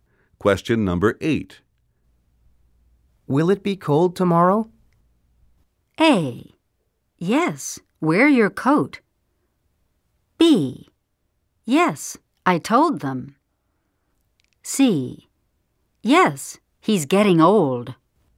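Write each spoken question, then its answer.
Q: Will it be cold tomorrow?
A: A: Yes, wear your coat.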